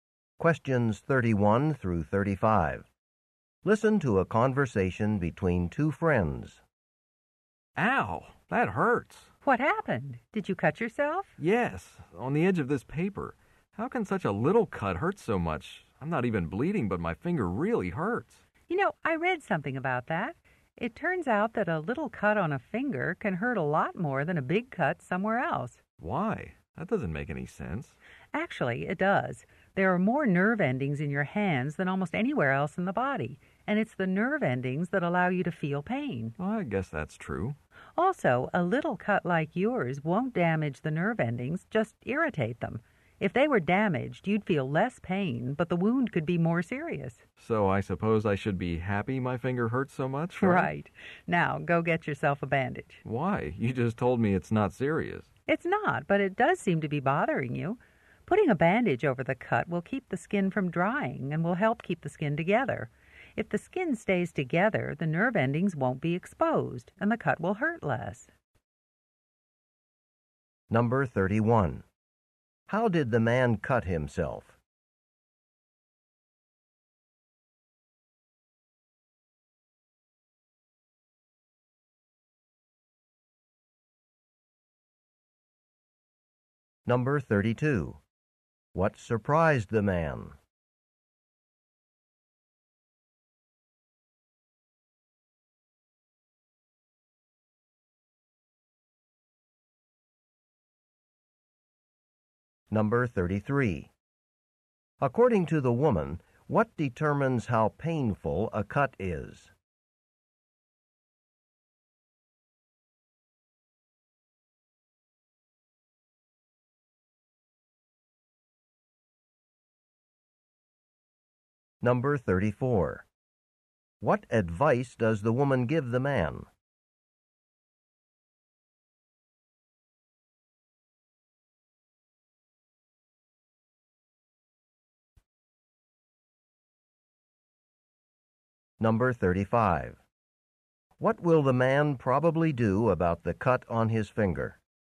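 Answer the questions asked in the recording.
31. On the edge of a piece of paper
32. That such a small cut could hurt so much
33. The number of nerve endings in the area of the cut
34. To put a bandage on the cut
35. Put a bandage on it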